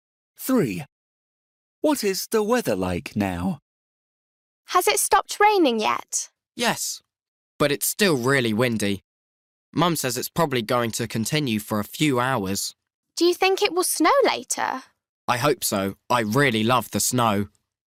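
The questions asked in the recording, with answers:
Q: What is the weather like now?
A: Windy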